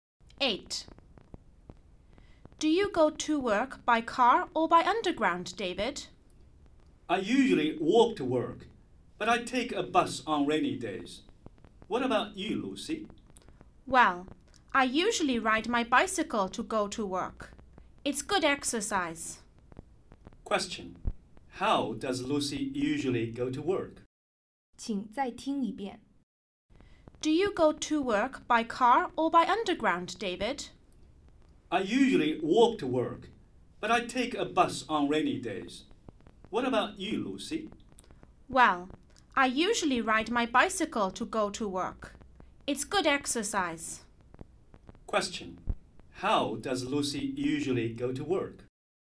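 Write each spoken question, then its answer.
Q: How does Lucy usually go to work?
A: By bicycle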